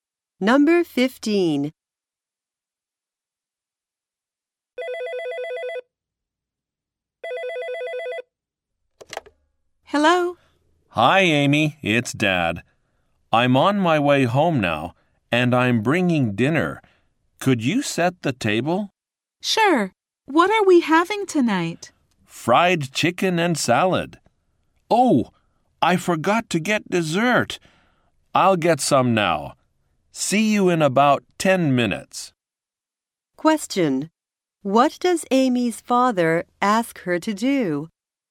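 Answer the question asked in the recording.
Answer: Set the table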